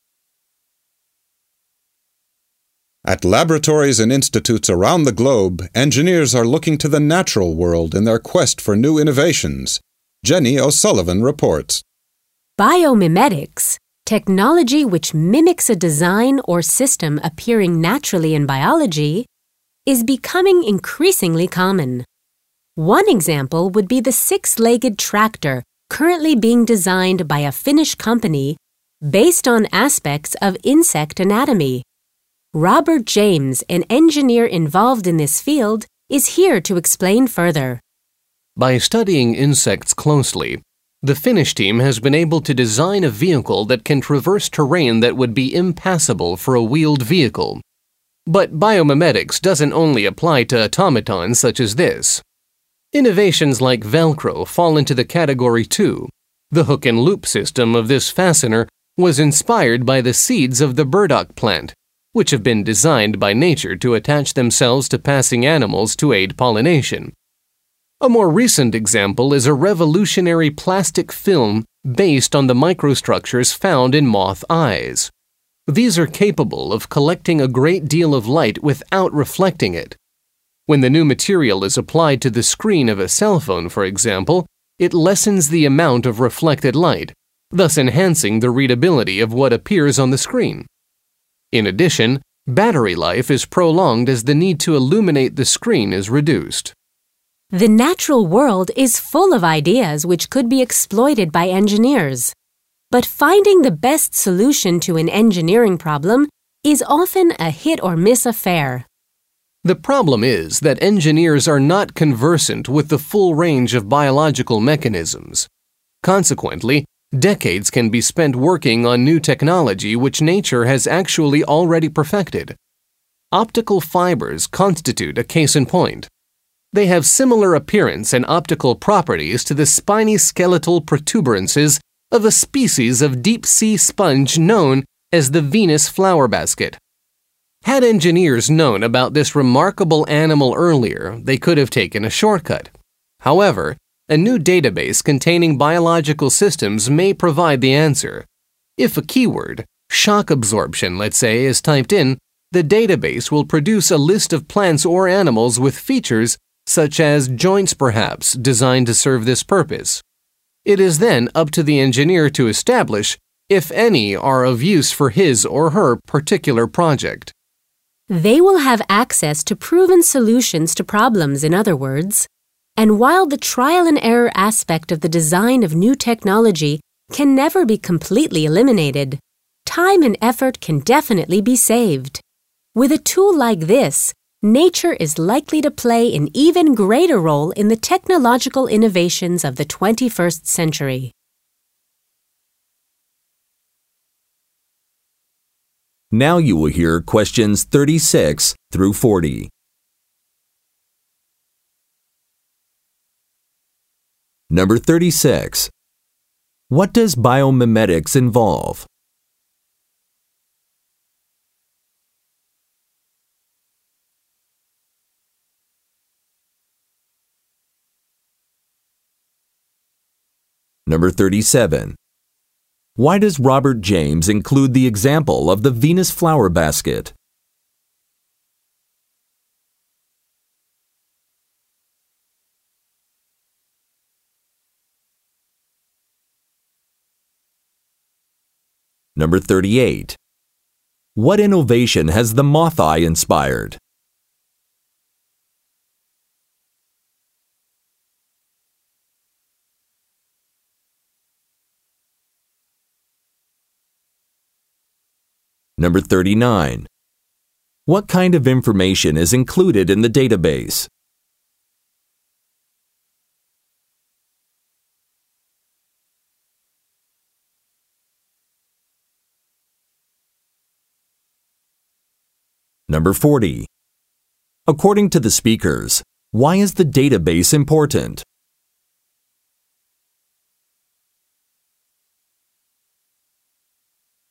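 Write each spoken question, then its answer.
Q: What does biomimetics involve?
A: Technology that mimics designs or systems found in nature

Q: Why does Robert James include the example of the Venus flower basket?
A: To show that engineers spent time developing technology (optical fibers) that nature had already perfected

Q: What innovation has the moth eye inspired?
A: A plastic film that reduces reflection on screens such as cell phones

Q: What kind of information is included in the database?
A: Biological systems: plants and animals with features that serve particular purposes

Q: According to the speakers, why is the database important?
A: It gives access to proven solutions, saving time and effort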